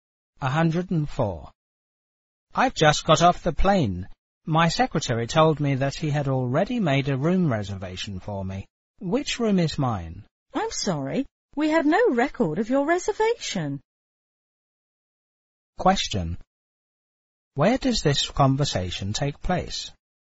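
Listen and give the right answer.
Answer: At a hotel.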